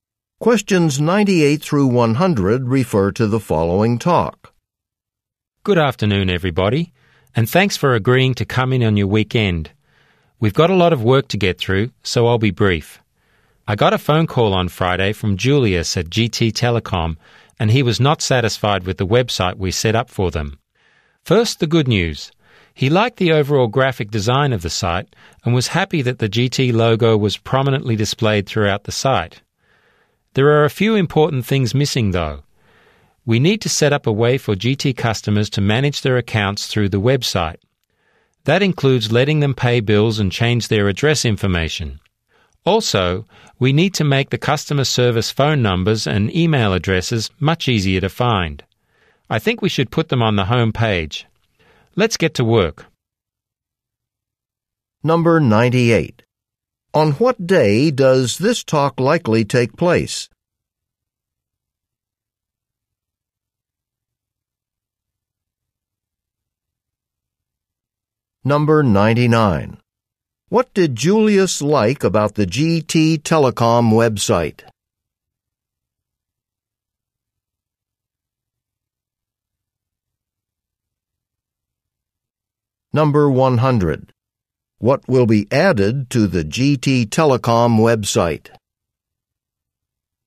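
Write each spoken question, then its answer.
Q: What did Julius like about the GT Telecom website?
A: The overall graphic design

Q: What will be added to the GT Telecom website?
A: A way for customers to manage their accounts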